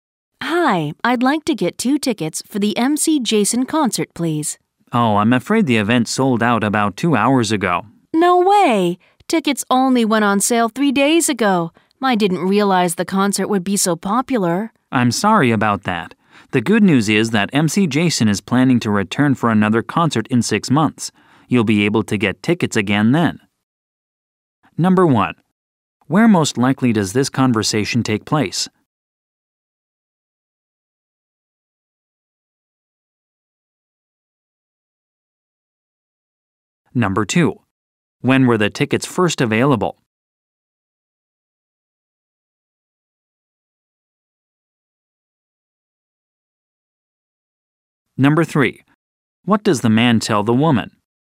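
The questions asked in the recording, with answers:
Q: When were the tickets first available?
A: 3 days ago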